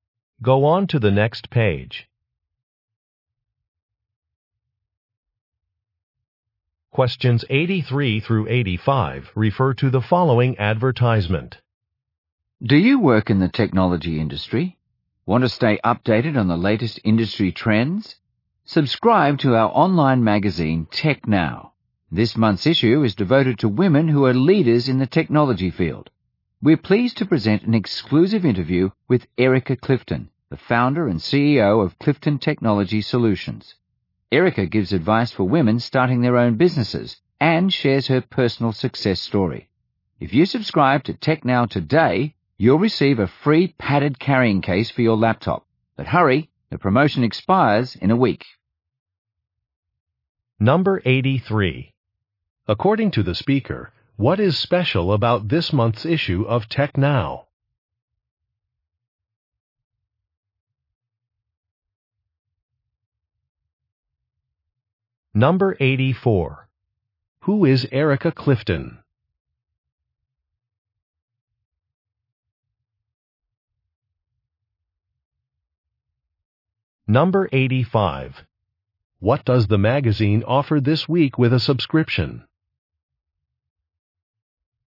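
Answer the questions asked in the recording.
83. It is about women leaders in technology
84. Founder and CEO of Clifton Technology Solutions
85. A free padded laptop carrying case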